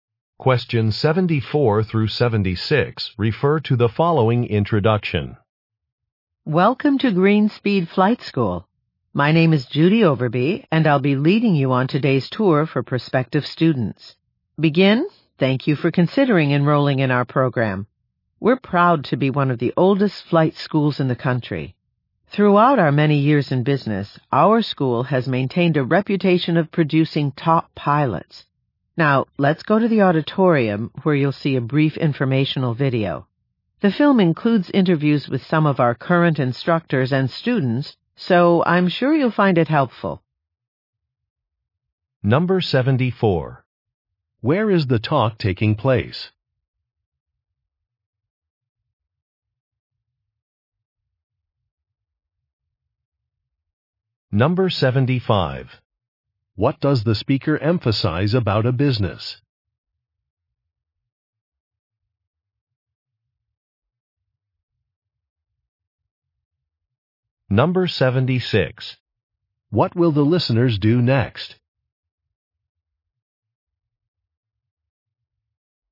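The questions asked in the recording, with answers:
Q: Where is the talk taking place?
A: At a flight school

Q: What does the speaker emphasize about a business?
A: It has a reputation for producing top pilots

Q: What will the listeners do next?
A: Watch an informational video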